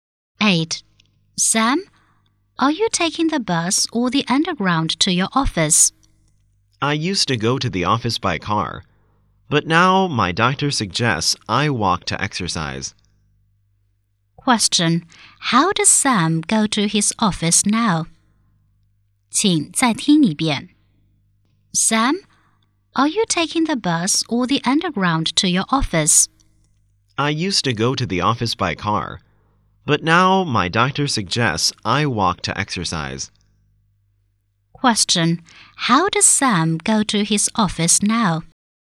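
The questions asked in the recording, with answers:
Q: How does Sam go to his office now?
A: He walks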